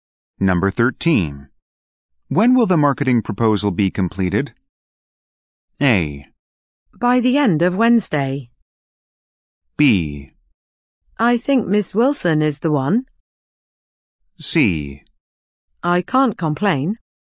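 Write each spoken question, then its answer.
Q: When will the marketing proposal be completed?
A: A: By the end of Wednesday.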